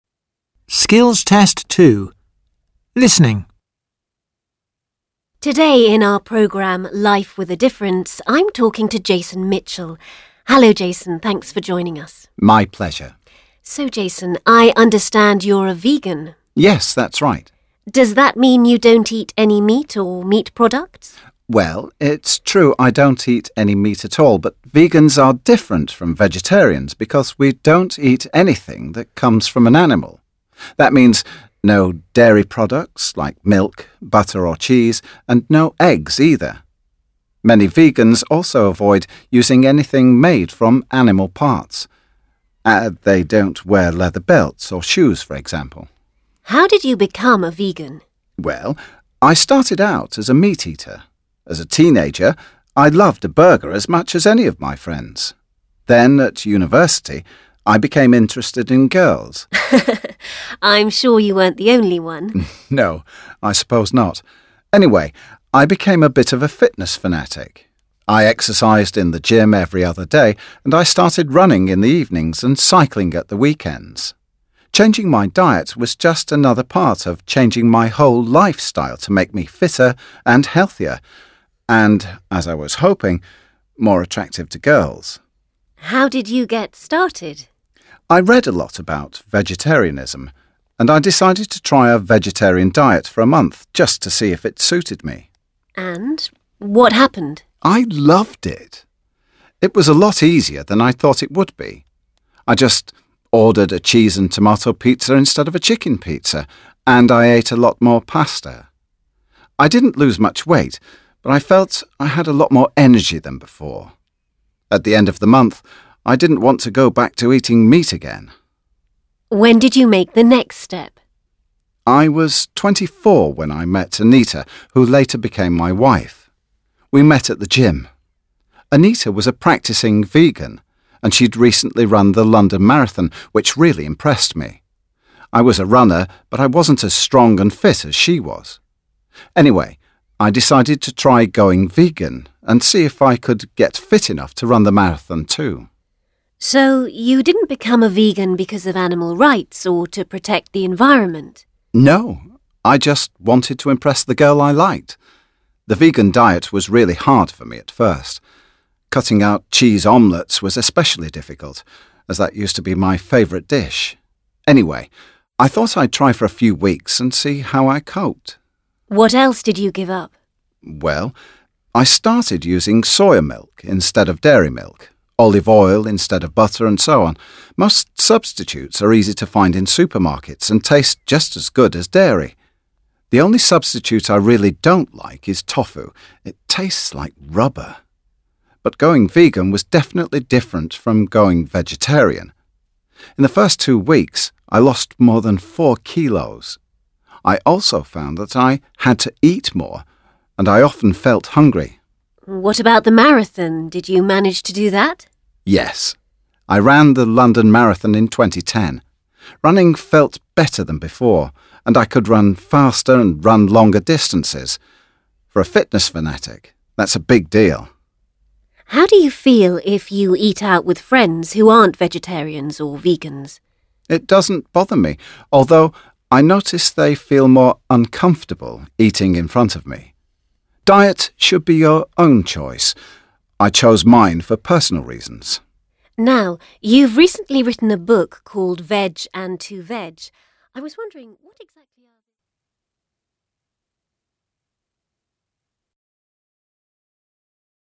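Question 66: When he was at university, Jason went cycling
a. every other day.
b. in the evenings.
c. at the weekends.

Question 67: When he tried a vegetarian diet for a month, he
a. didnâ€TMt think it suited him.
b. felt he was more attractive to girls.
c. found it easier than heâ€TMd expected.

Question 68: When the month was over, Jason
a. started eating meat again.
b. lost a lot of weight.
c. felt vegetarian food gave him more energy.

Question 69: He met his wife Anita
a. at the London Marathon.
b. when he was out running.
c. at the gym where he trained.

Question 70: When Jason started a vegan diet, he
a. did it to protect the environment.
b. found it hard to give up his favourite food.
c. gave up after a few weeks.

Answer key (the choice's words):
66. at the weekends.
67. found it easier than heâ€TMd expected.
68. felt vegetarian food gave him more energy.
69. at the gym where he trained.
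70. found it hard to give up his favourite food.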